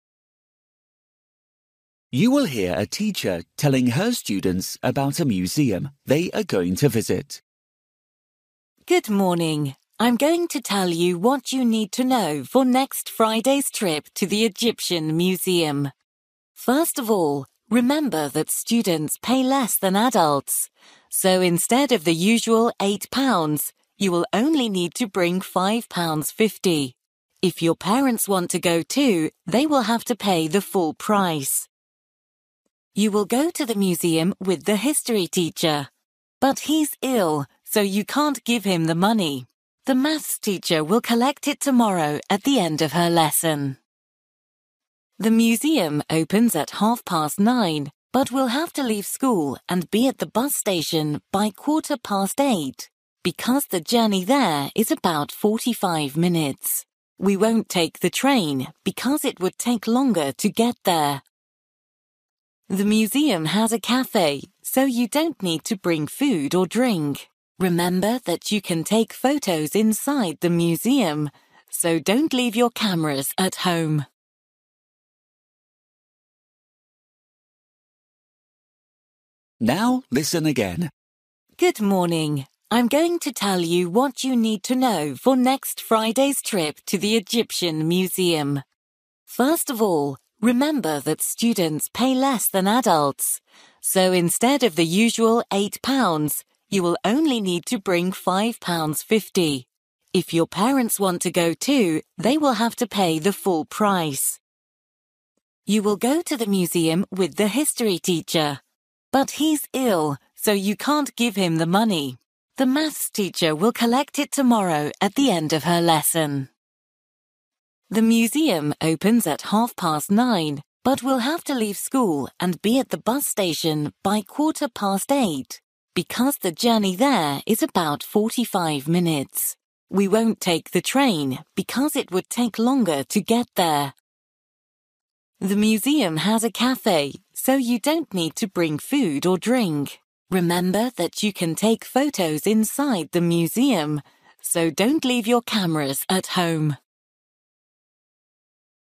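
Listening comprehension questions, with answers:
For each question, write the correct answer in the gap. Write one word or a number or a date or a time.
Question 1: Cost of the ticket (students): (1) £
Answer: 5.50

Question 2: Give money to: (2) teacher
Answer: maths

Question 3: Time to leave school: (3)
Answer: 8:15

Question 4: Travel by: (4)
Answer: bus

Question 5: Bring: (5)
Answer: camera

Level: Luyện nghe trình độ A2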